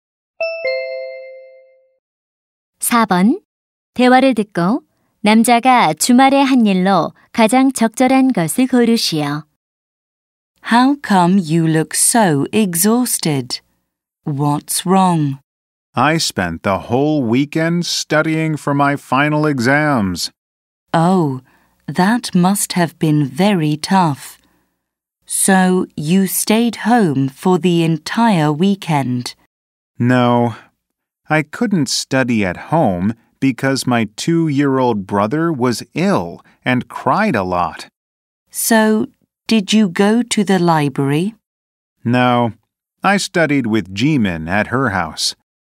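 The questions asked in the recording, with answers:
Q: 대화를 듣고 남자가 주말에 한 일로 가장 적절한 것을 고르시오.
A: 지민이네 집에서 기말고사 공부를 했다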